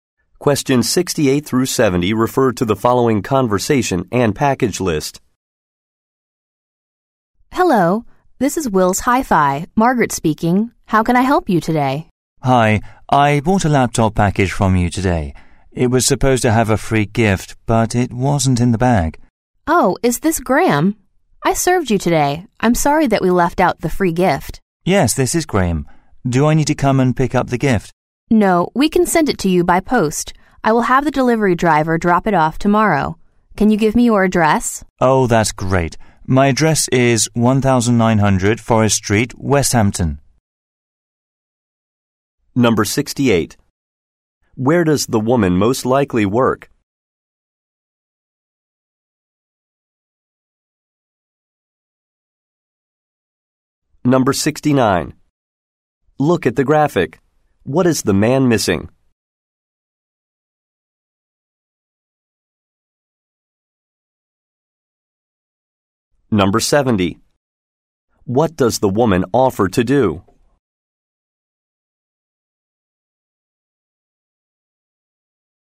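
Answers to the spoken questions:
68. At an electronics store (Will's Hi-Fi)
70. Send the free gift to him by post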